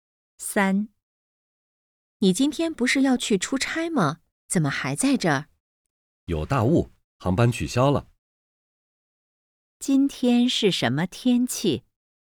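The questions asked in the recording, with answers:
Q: 今天是什么天气?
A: 有大雾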